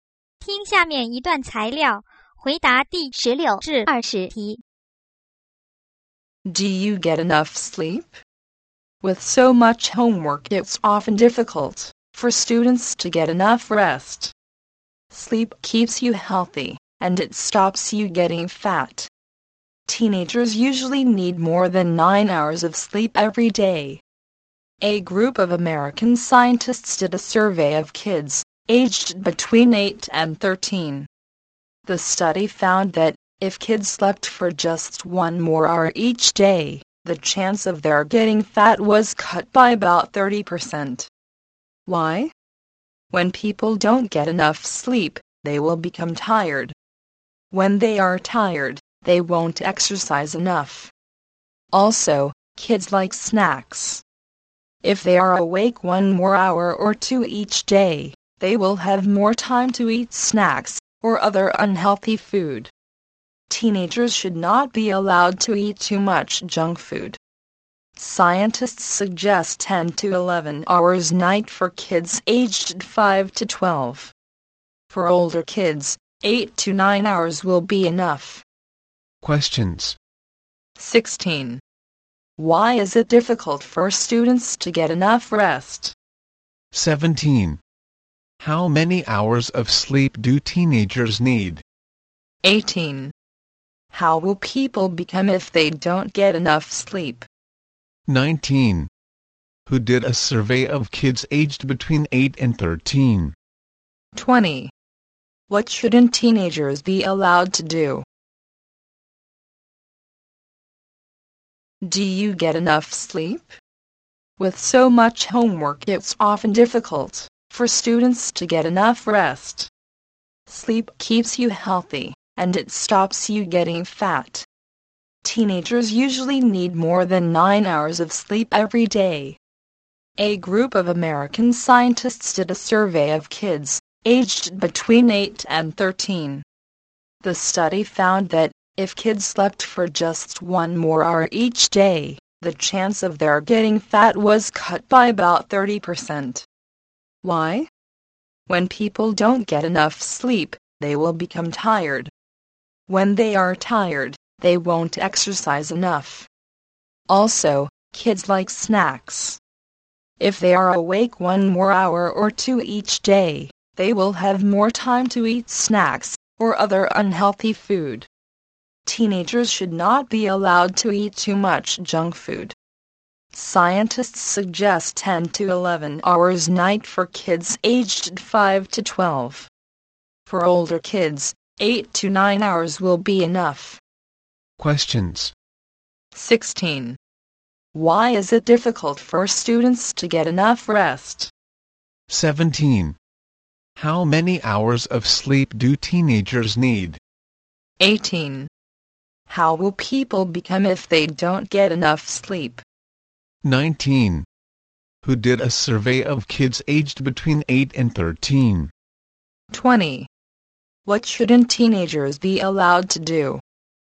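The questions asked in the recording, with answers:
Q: Why is it difficult for students to get enough rest?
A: They have so much homework

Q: How many hours of sleep do teenagers need?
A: More than 9 hours

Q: How will people become if they don't get enough sleep?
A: Tired

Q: Who did a survey of kids aged between 8 and 13?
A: A group of American scientists

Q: What shouldn't teenagers be allowed to do?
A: Eat too much junk food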